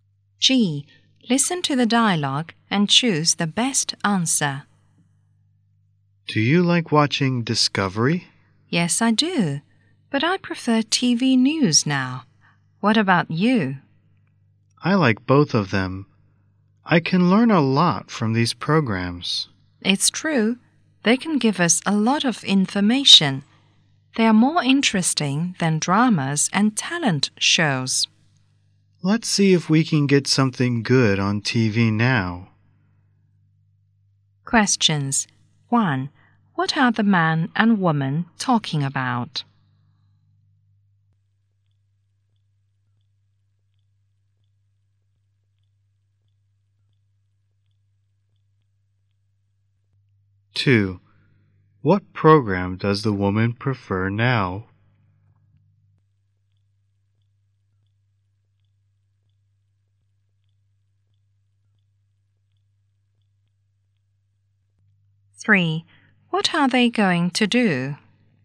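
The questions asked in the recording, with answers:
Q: What are the man and woman talking about?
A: TV programs

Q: What are they going to do?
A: Watch TV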